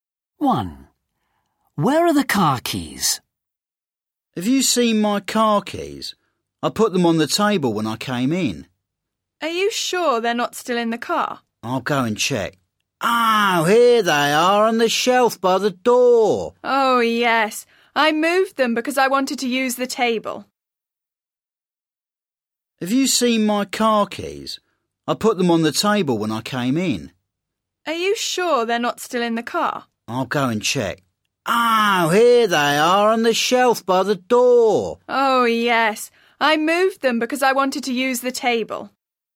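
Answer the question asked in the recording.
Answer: On the shelf by the door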